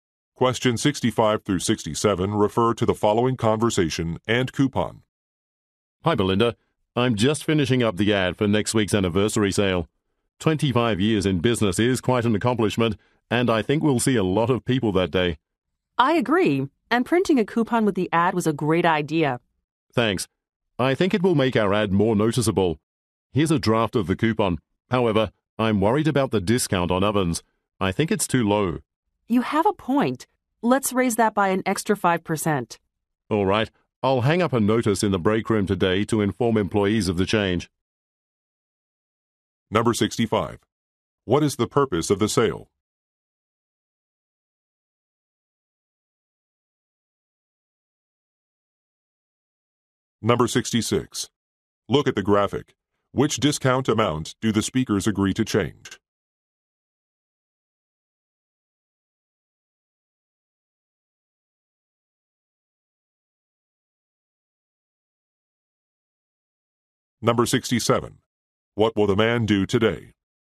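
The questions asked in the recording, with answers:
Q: What is the purpose of the sale?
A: To celebrate the 25th anniversary

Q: What will the man do today?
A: Post a notice in the break room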